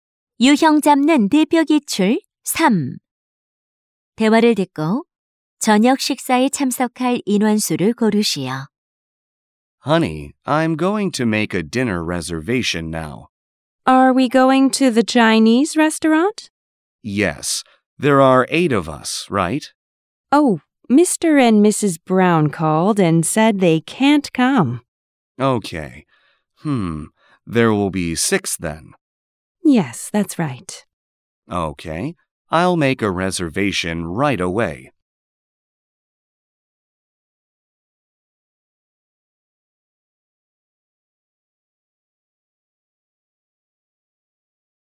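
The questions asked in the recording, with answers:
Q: 대화를 듣고 저녁 식사에 참석할 인원수를 고르시오.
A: 6명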